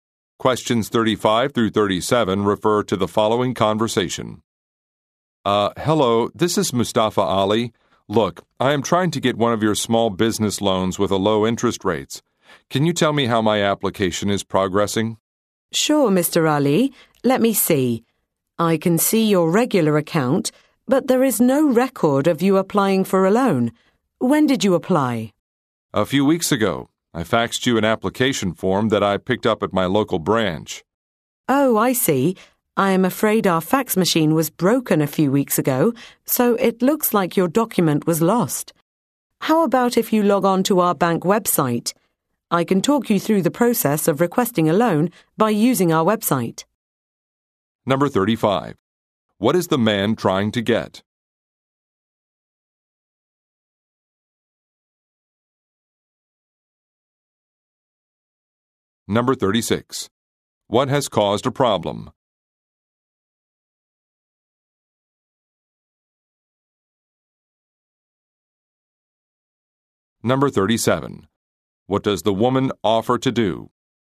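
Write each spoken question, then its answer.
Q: What is the man trying to get?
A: A small business loan

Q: What has caused a problem?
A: A broken fax machine

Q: What does the woman offer to do?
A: Talk him through applying for a loan on the bank website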